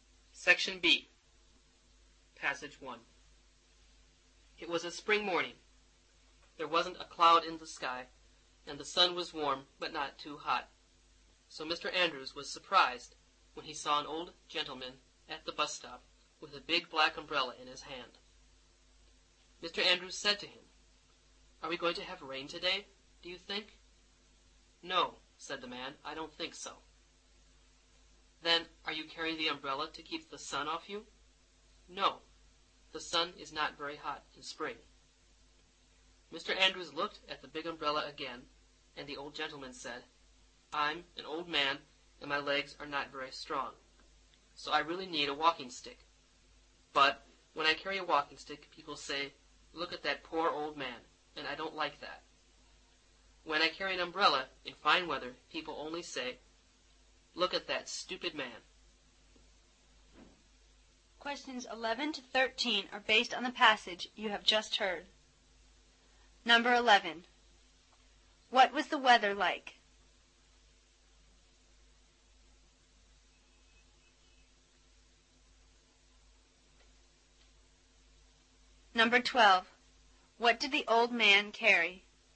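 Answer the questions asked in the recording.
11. Sunny, cloudless and warm
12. A big black umbrella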